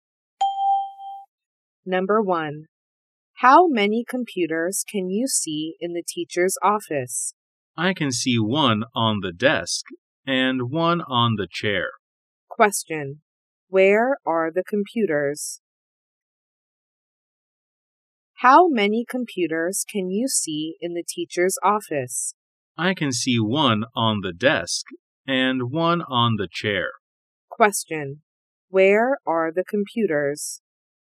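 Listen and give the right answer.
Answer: One is on the desk and one is on the chair.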